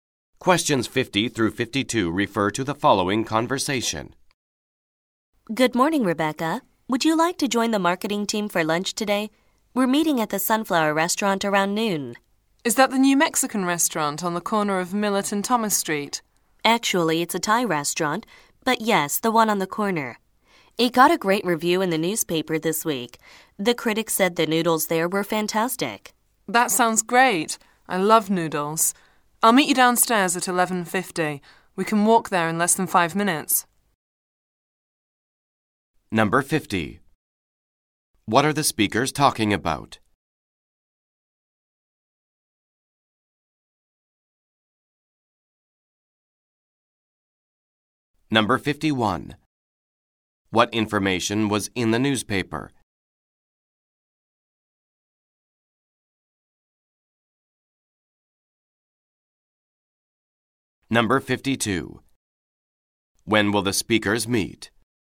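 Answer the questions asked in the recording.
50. Having lunch together at a restaurant
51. A good review of the restaurant
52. At 11:50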